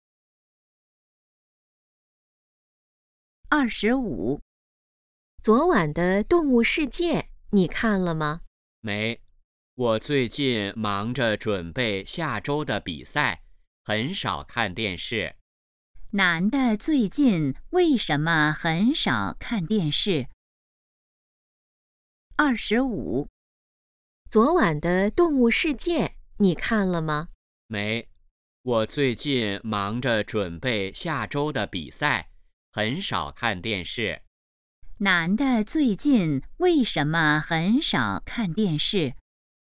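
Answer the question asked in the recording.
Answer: 忙着准备下周的比赛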